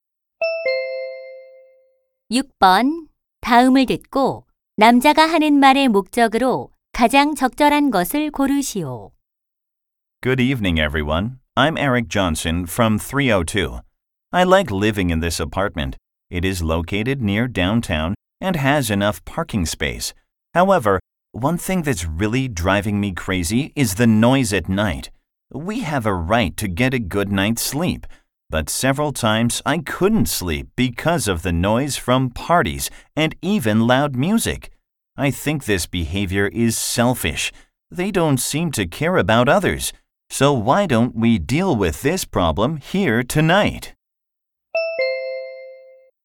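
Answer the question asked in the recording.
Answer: 야간 소음 문제 해결을 논의하자고 제안하려고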